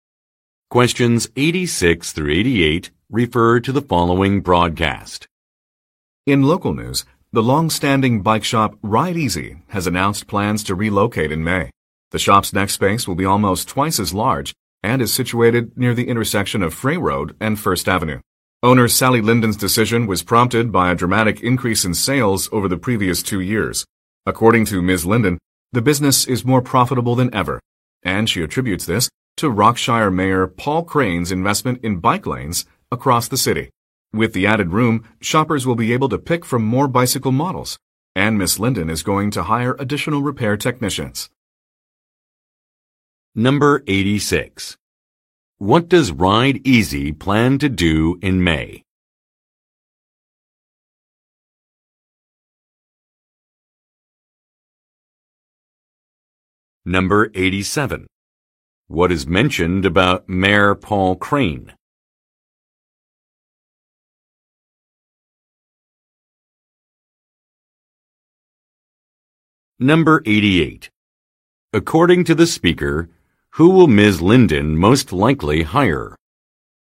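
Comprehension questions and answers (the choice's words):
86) What does Ride Easy plan to do in May?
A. Launch an advertising campaign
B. Move to another location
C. Organize an event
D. Partner with another firm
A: Move to another location

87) What is mentioned about Mayor Paul Crane?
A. He will attend a grand opening.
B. He released a public statement.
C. He invested in infrastructure.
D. He approved bicycle regulations.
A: He invested in infrastructure.

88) According to the speaker, who will Ms. Linden most likely hire?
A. Accountants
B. Models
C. Technicians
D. Salespeople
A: Technicians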